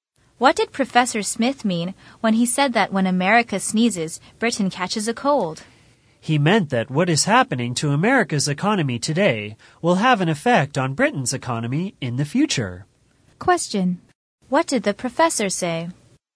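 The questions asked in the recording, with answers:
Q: What did the professor say?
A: What happens to America's economy today will affect Britain's economy in the future.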